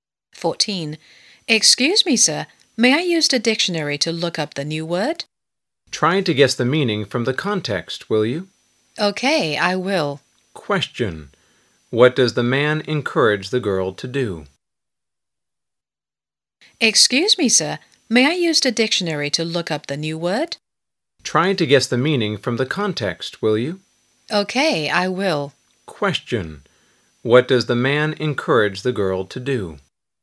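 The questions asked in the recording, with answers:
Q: Question. What does the man encourage the girl to do?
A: Guess the word's meaning from the context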